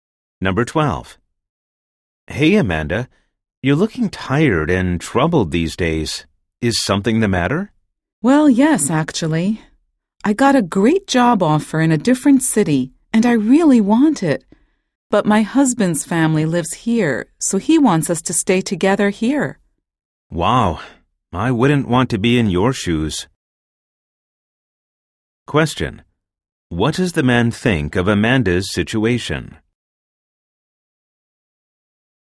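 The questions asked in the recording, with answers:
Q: What does the man think of Amanda's situation?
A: He thinks it is a difficult situation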